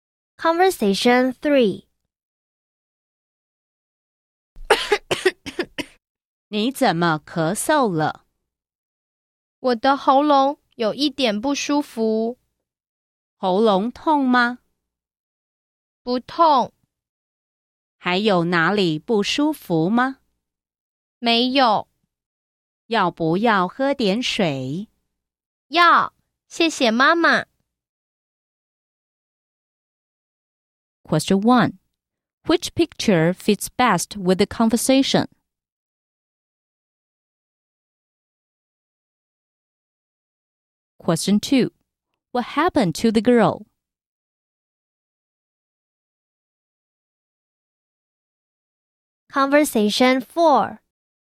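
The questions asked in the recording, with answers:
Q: What happened to the girl?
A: She is coughing; her throat feels a little uncomfortable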